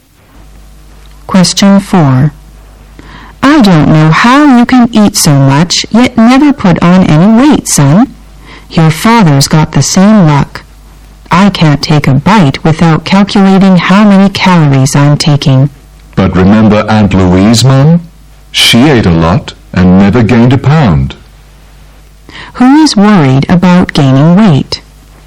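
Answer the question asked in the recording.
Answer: The mother (the woman).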